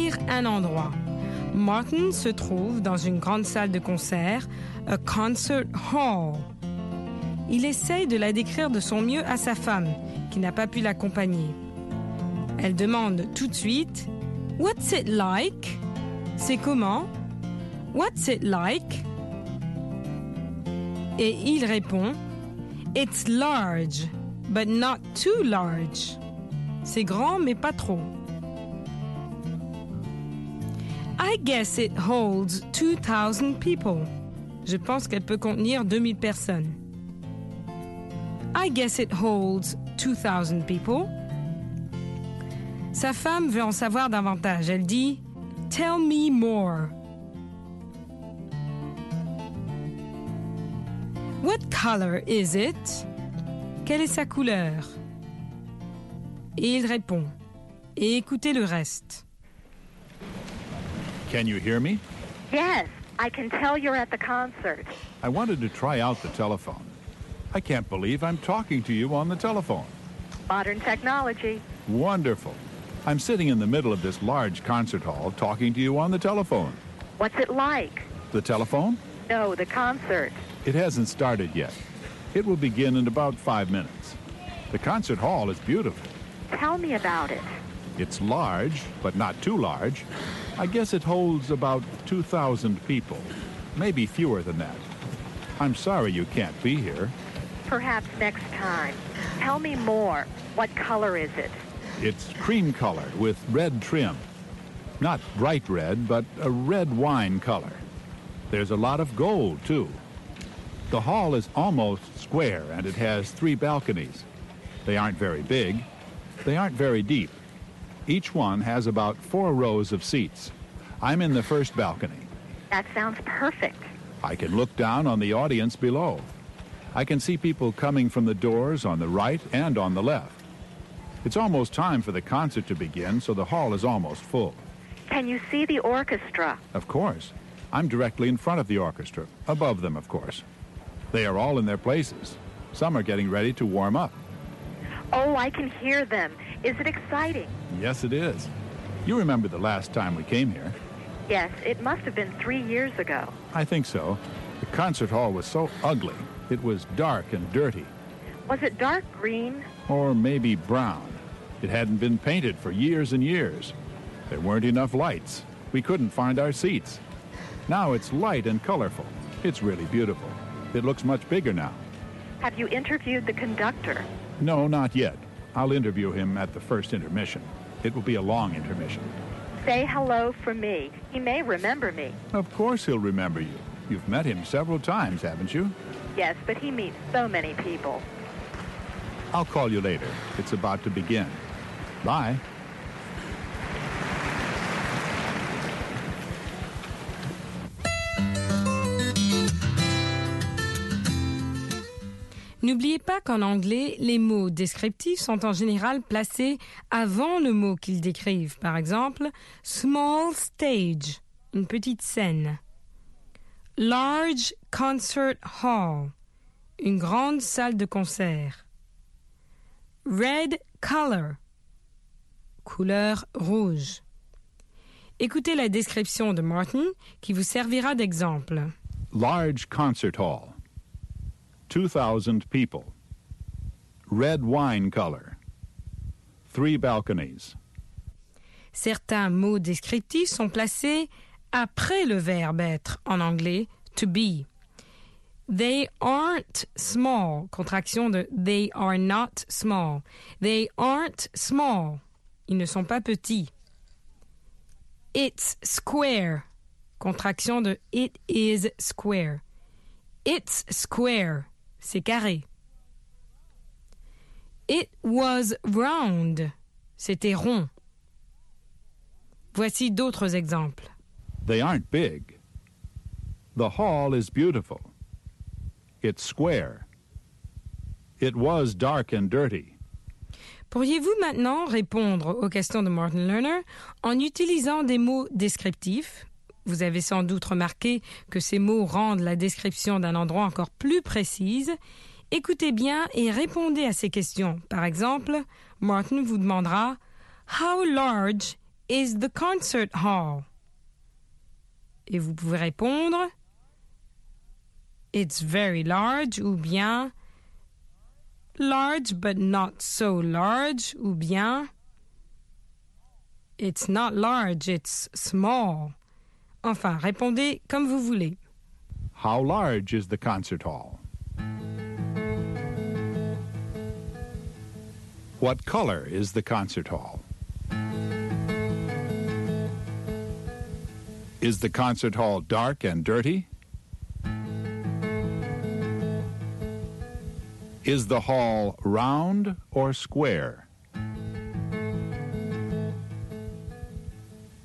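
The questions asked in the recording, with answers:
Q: How large is the concert hall?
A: Large, but not too large; it holds about 2,000 people

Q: What color is the concert hall?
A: Cream color with red (wine) trim and a lot of gold

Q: Is the concert hall dark and dirty?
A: No, it's light and colorful now

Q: Is the hall round or square?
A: Almost square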